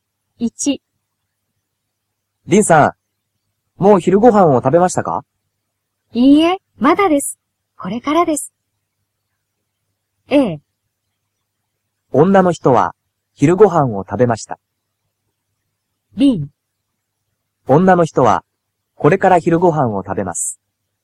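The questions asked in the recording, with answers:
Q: リンさん、もう昼ご飯を食べましたか?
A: B: 女の人はこれから昼ご飯を食べます。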